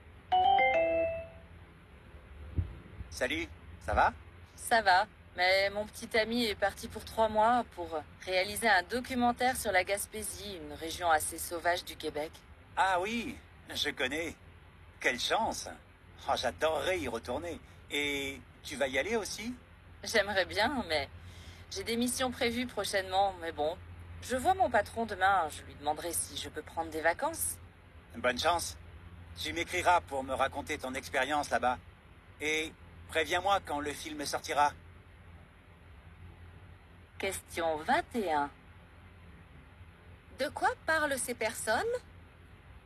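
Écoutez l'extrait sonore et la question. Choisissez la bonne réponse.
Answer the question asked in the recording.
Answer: Du voyage du petit ami en Gaspésie pour un documentaire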